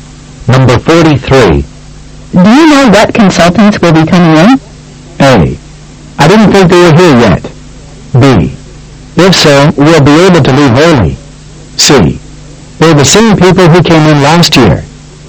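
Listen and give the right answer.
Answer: C: They're the same people who came in last year.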